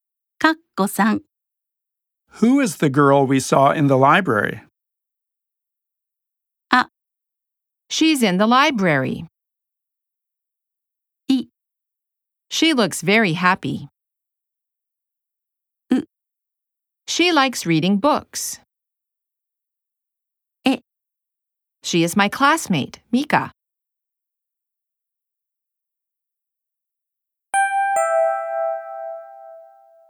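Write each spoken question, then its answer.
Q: Who is the girl we saw in the library?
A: D: She is my classmate, Mika.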